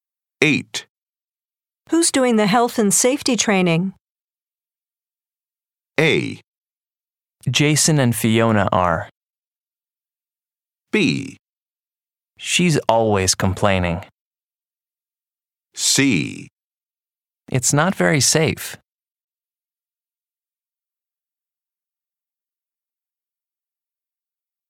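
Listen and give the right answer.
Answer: A: Jason and Fiona are.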